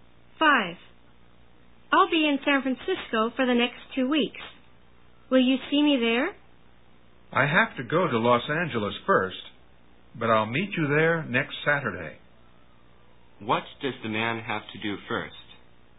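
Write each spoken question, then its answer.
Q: What does the man have to do first?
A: Go to Los Angeles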